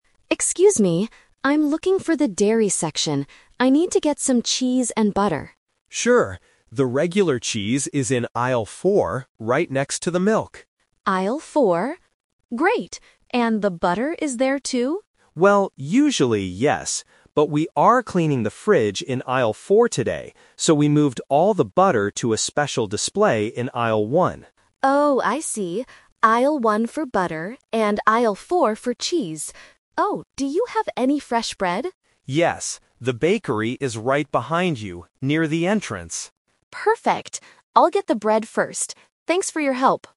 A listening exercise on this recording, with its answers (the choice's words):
Listen to the conversation between a customer and a supermarket employee, and choose the correct answer (A, B, or C) for each question.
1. Where can the customer find the cheese?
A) In aisle one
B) In aisle four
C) Near the entrance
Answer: In aisle four

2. Why is the butter in a different place today?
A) Because they are cleaning the fridge.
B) Because they are completely sold out.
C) Because it is a new product.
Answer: Because they are cleaning the fridge.

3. What is the customer going to get first?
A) Bread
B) Butter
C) Cheese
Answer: Bread

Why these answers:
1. The employee clearly states, "The regular cheese is in aisle four." Option (A) is the trap; aisle one is where the butter was moved to. Option (C) is also a trap; near the entrance is where the bakery (bread) is located.
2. The employee explains the change by saying, "But we are cleaning the fridge in aisle four today. So, we moved all the butter..." Option (B) is a common supermarket problem but is not true here. Option (C) is plausible for a "special display" but is never mentioned.
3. At the end of the conversation, the customer says, "I'll get the bread first." Options (B) and (C) are traps; cheese and butter are the main items she was looking for, but she decides to pick up the bread before getting them.